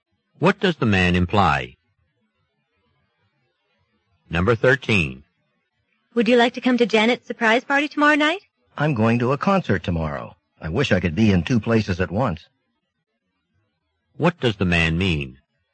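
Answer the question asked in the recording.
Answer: He can't go to the party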